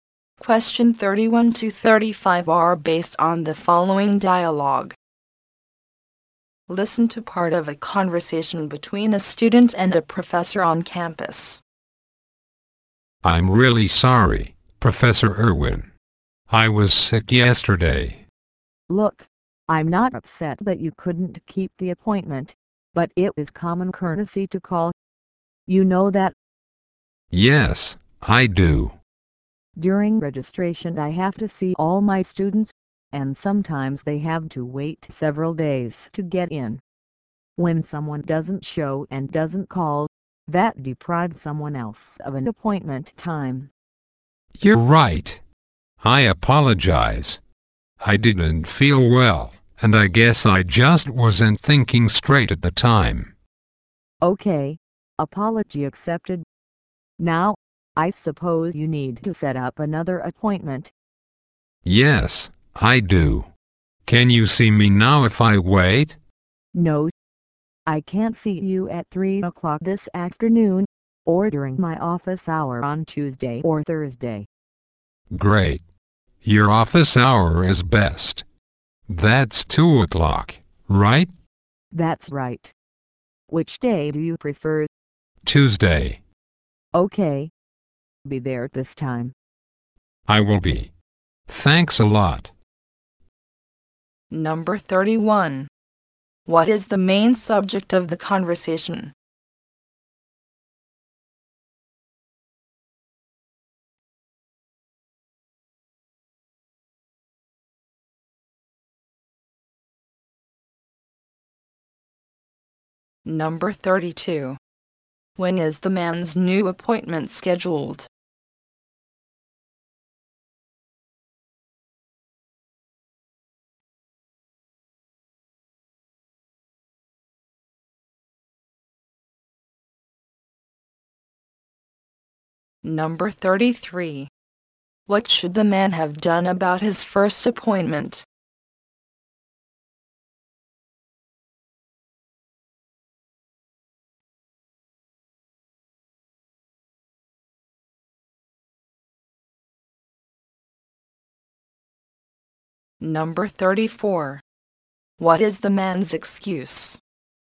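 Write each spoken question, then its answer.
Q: When is the man's new appointment scheduled?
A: Tuesday at 2 o'clock

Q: What should the man have done about his first appointment?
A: Called to say he couldn't come

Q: What is the man's excuse?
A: He was sick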